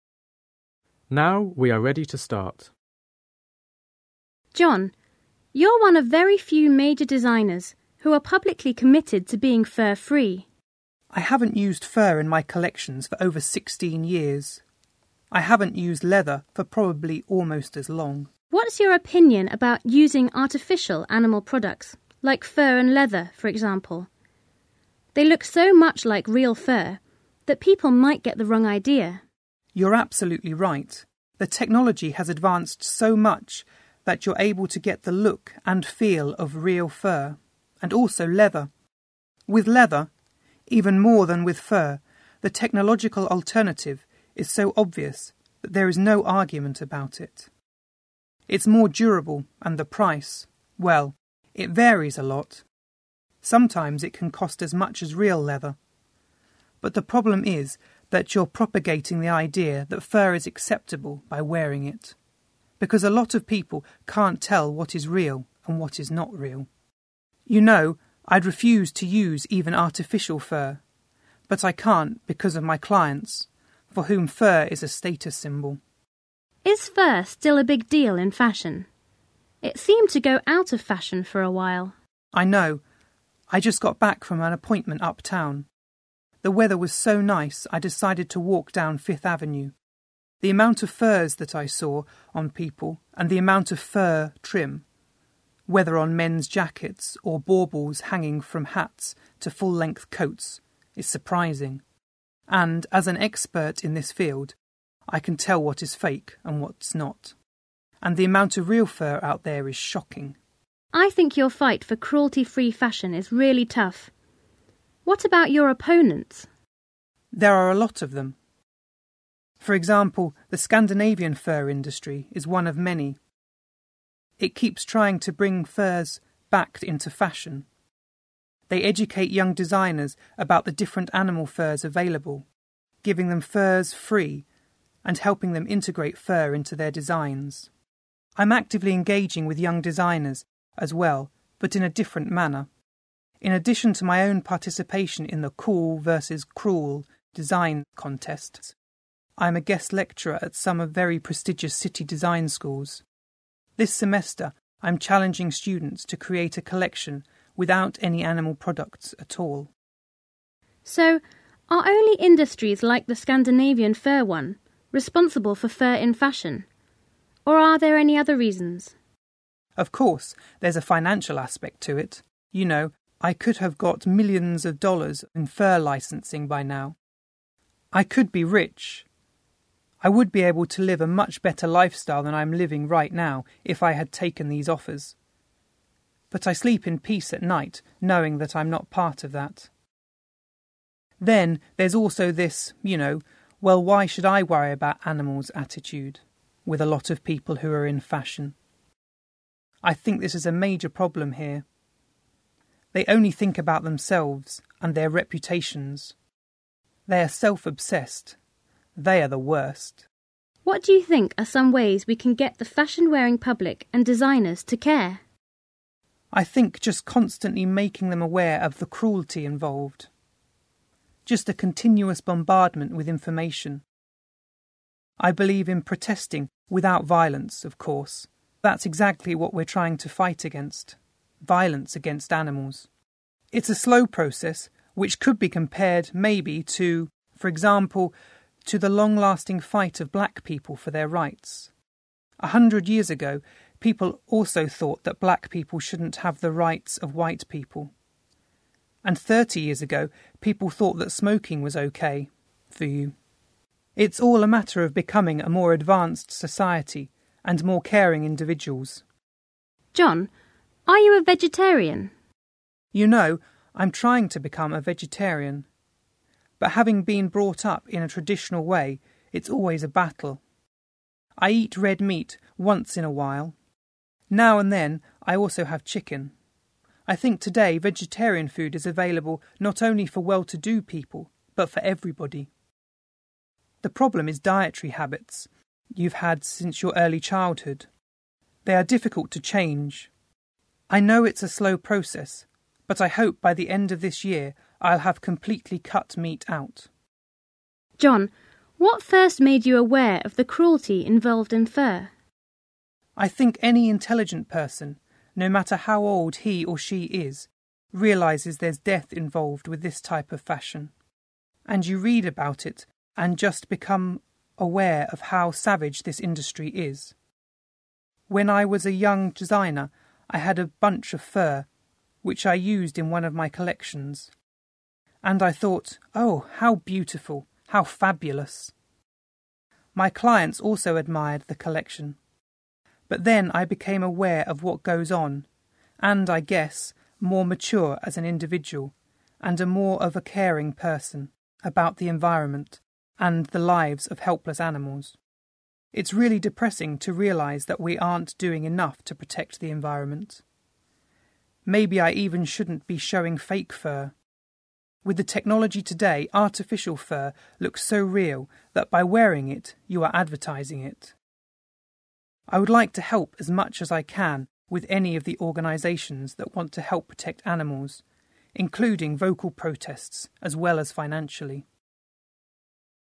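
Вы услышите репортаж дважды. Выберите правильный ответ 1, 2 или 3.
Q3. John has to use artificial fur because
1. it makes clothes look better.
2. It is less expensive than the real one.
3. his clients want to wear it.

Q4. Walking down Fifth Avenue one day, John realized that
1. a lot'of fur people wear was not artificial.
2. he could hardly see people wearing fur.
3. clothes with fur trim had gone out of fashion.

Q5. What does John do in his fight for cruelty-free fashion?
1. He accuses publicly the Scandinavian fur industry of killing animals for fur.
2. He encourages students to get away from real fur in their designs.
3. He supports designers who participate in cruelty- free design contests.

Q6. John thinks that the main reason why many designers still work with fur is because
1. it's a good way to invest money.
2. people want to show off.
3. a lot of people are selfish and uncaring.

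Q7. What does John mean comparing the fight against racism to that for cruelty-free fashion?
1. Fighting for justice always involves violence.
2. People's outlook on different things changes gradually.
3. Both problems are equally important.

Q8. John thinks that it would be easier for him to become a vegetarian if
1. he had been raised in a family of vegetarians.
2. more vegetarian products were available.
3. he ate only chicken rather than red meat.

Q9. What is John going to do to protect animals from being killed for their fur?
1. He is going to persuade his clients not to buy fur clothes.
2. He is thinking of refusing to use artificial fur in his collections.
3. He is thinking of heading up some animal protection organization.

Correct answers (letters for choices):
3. 3
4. 1
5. 2
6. 3
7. 2
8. 1
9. 2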